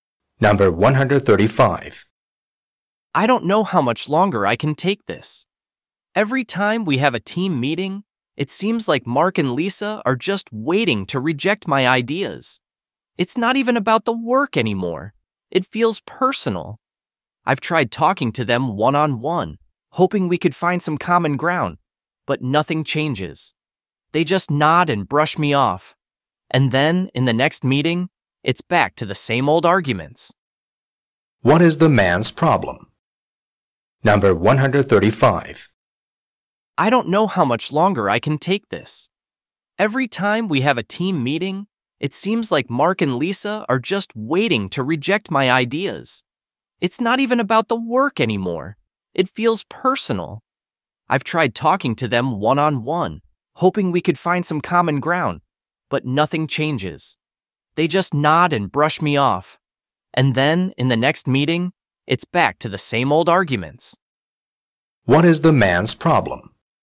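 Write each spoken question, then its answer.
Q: What is the man's problem?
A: Conflict with colleagues who reject his ideas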